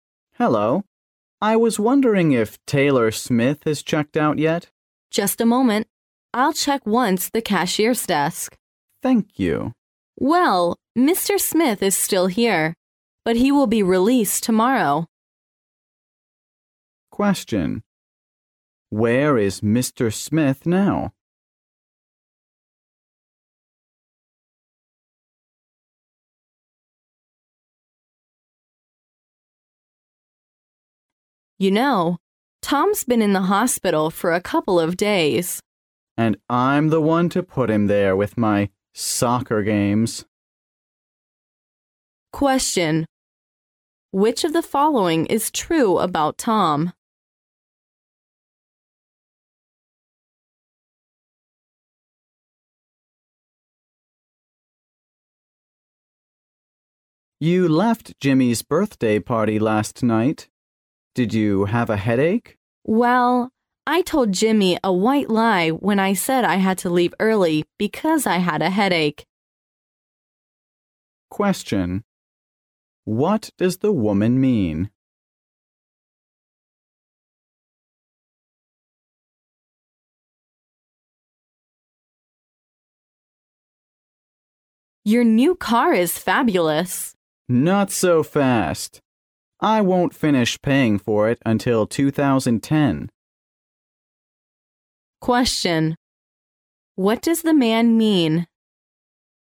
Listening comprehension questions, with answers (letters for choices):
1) Where is Mr. Smith now?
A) In a hotel.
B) In the hospital.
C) In the prison.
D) At the airport.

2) What does the man mean?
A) His new car is not fast enough.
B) His new car moves very fast.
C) His new car is a real bargain.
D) His new car is somewhat of a financial burden.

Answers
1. B
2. D

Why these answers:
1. 关键句"But he will be released tomorrow. "意为"但是他明天会出院"。由此可推断Mr. Smith现在应该是在医院。
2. "I won't finish paying for it until 2010. "意为"我直到2010年才能付完车款。"因此男士的意思应该是经济上有压力。